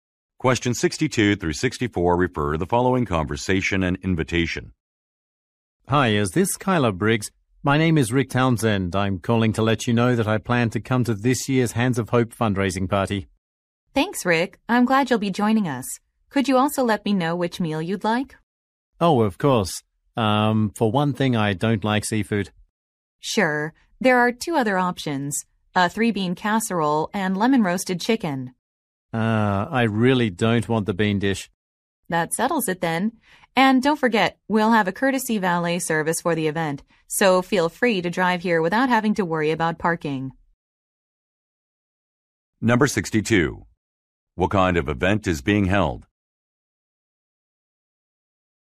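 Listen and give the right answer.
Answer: A fundraising party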